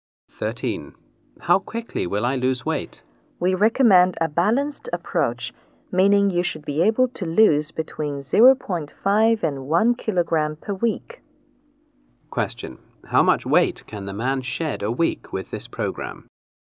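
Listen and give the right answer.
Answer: Between 0.5 and 1 kilogram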